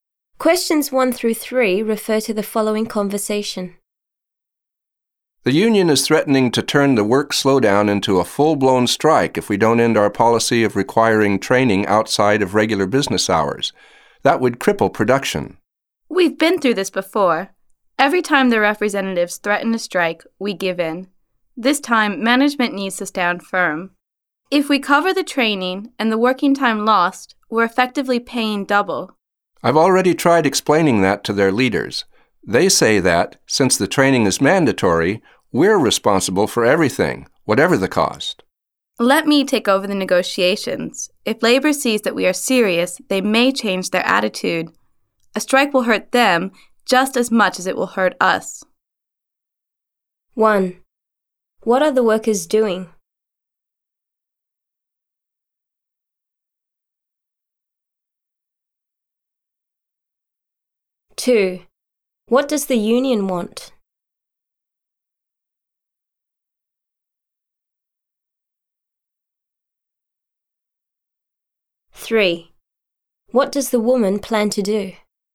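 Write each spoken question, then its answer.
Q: What are the workers doing?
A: Staging a work slowdown

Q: what does the union want?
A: An end to required training outside regular business hours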